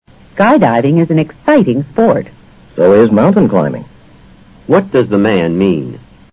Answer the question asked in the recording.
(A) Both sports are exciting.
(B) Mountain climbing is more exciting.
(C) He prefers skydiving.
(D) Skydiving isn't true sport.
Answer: (A) Both sports are exciting.

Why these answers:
So is mountain climbing = Mountain climbing is an exciting sport, too. 男方这样说是补充了女方的说话内容。A表达了他的意思。Skydiving: 延缓张伞的跳伞运动。mountain climbing: 登山运动。